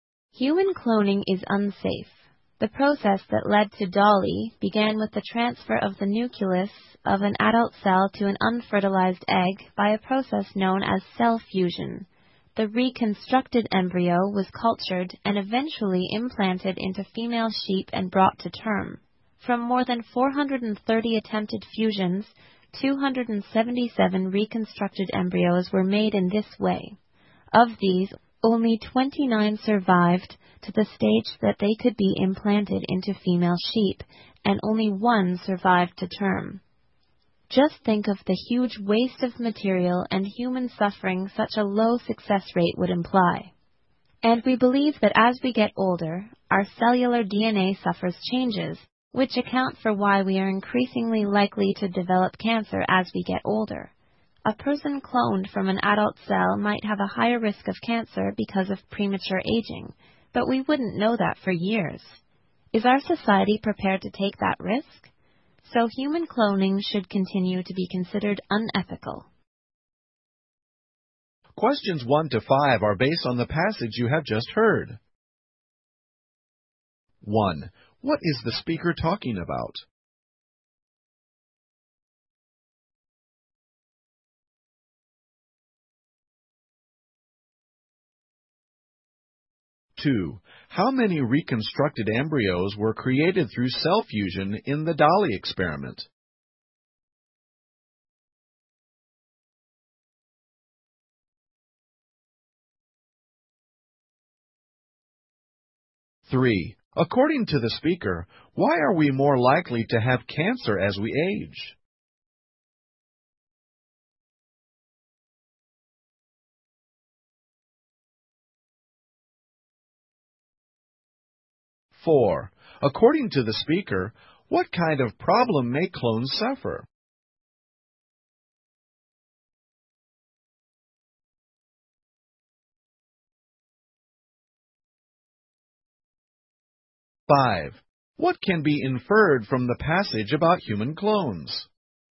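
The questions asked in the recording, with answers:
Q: How many reconstructed embryos were created through cell fusion in the Dolly experiment?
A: 277

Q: According to the speaker, why are we more likely to have cancer as we age?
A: Our cellular DNA changes as we get older.

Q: According to the speaker, what kind of problem may clones suffer?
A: A higher risk of cancer because of premature aging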